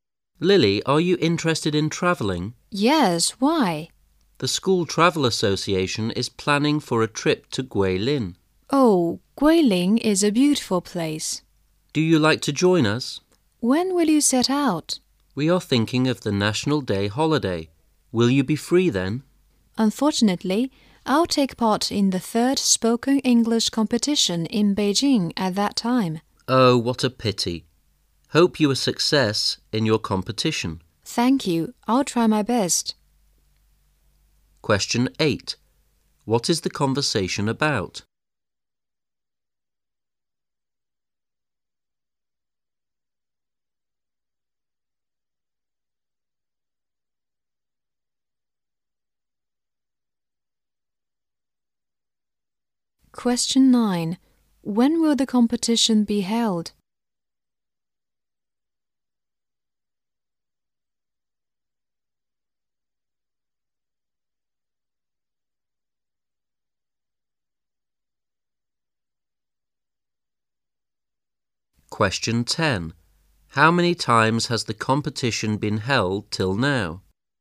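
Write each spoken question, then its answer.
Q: When will the competition be held?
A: During the National Day holiday

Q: How many times has the competition been held till now?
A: Three times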